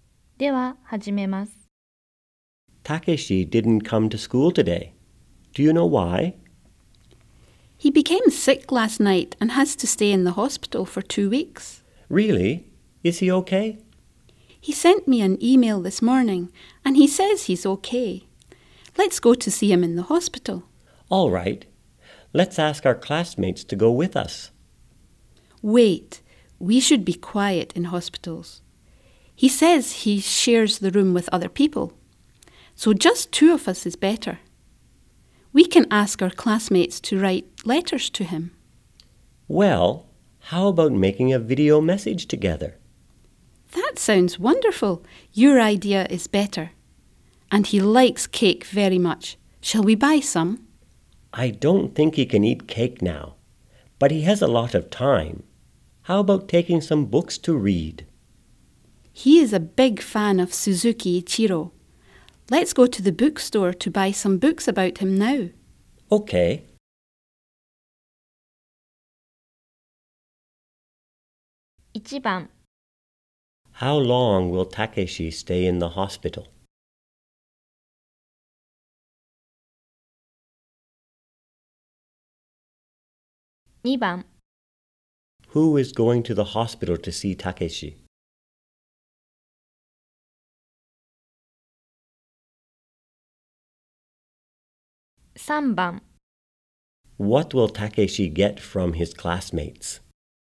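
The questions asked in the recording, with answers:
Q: How long will Takeshi stay in the hospital?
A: For two weeks

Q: What will Takeshi get from his classmates?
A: A video message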